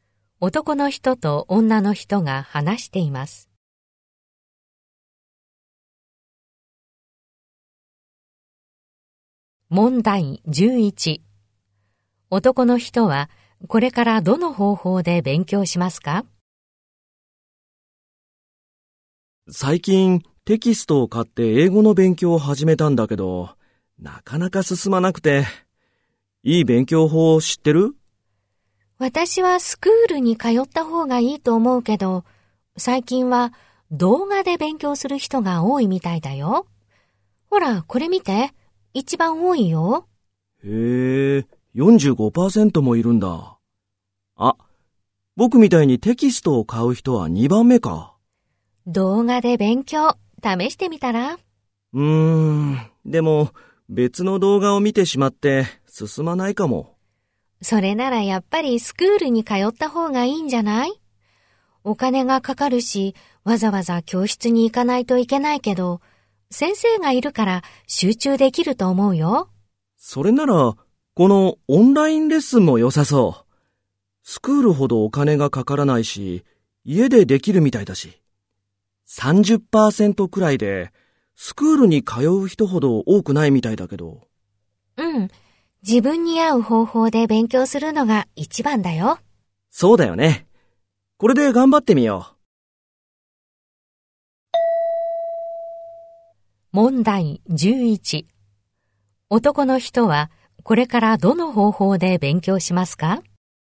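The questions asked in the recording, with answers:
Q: 男の人はこれからどの方法で勉強しますか?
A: オンラインレッスン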